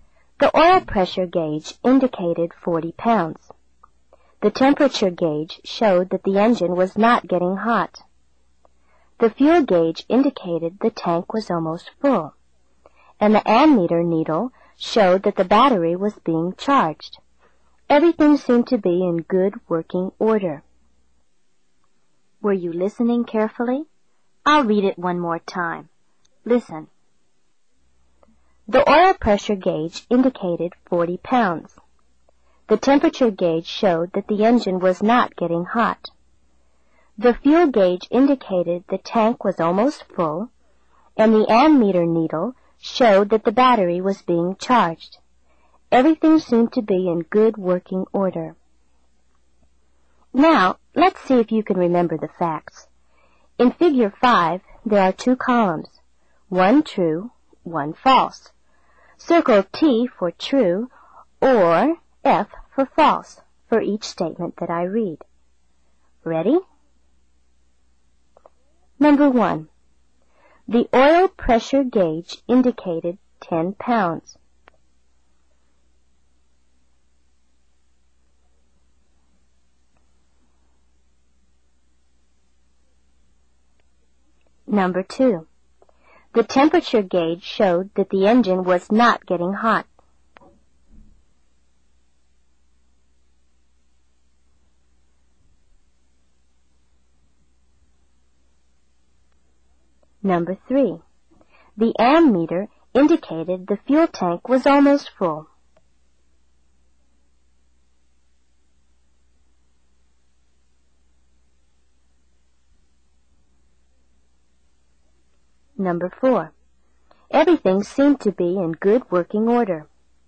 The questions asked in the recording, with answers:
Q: The oil pressure gauge indicated 10 pounds.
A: This is false. Remember, I read the oil pressure gauge indicated 40 pounds.

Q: The temperature gauge showed that the engine was not getting hot.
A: Number 2 is true.

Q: The ammeter indicated the fuel tank was almost full.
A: This is false. The ammeter doesn't tell you how much fuel you have.

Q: Everything seemed to be in good working order.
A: Number 4, of course, is true.